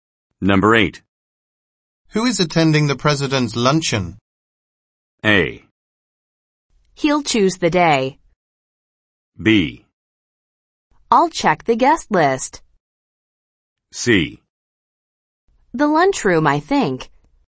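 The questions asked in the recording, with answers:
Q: Who is attending the president's luncheon?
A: B: I'll check the guest list.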